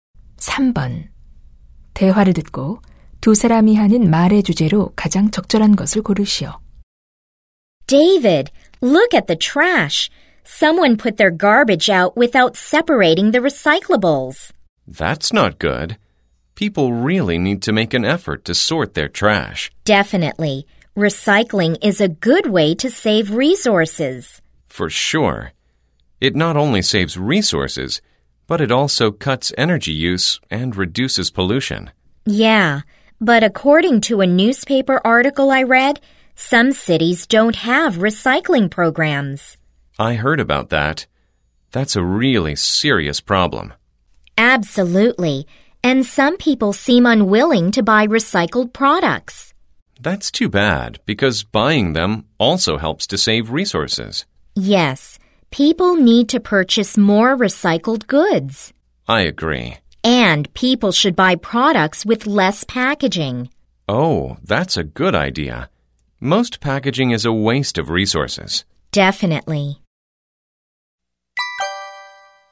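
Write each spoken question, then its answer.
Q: 대화를 듣고 두 사람이 하는 말의 주제로 가장 적절한 것을 고르시오.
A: 자원 절약을 위한 재활용과 재활용품 구매의 필요성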